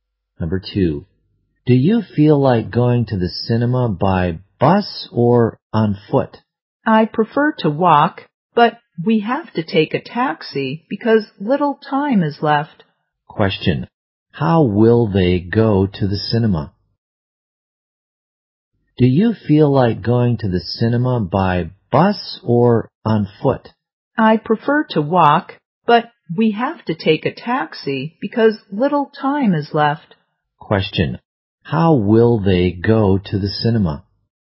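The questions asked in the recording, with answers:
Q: how will they go to the cinema?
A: By taxi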